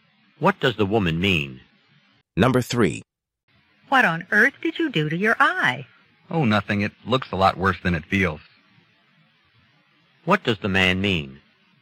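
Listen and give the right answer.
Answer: His eye doesn't hurt much.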